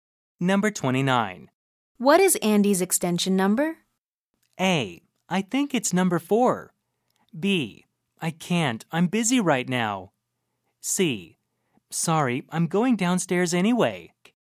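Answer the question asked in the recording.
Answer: A: I think it's number 4.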